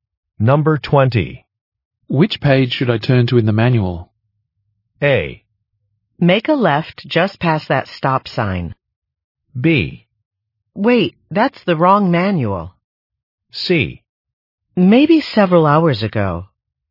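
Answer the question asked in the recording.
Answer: B: Wait, that's the wrong manual.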